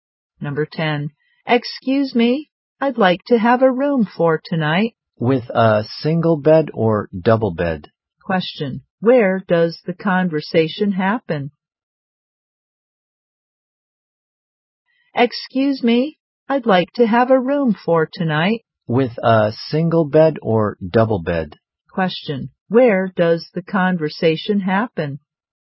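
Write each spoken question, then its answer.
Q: Where does the conversation happen?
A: In a hotel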